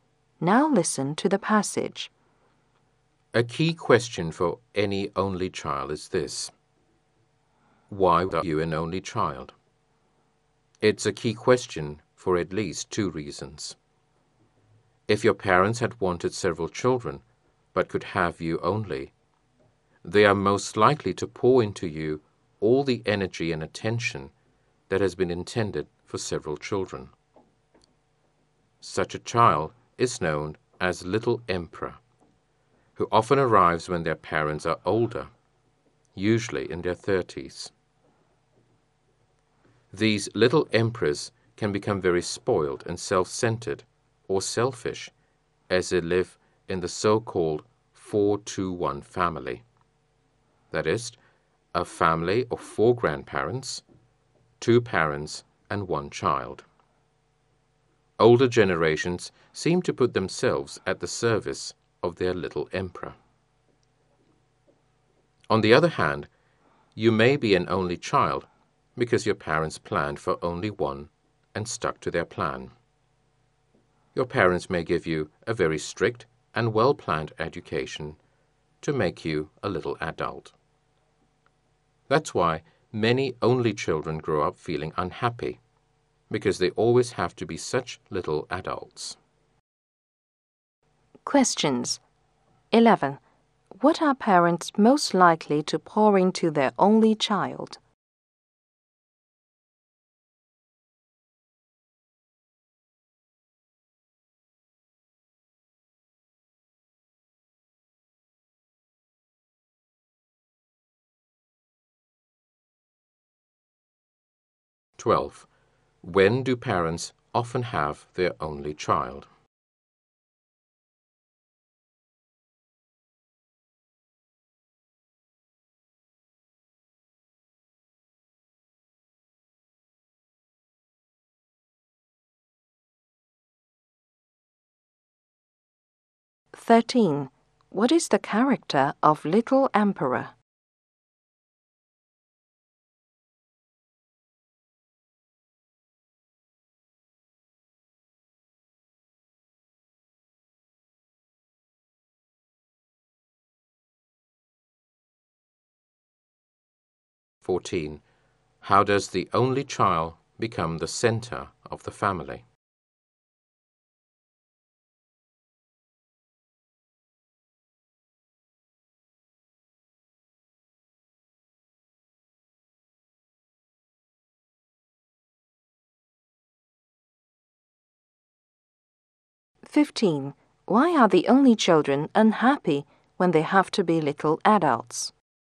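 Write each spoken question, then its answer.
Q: What are parents most likely to pour into their only child?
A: All their energy and attention

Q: When do parents often have their only child?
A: In their 30s

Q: What is the character of Little Emperor?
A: Spoiled and selfish

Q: How does the only child become the center of the family?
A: Older generations serve them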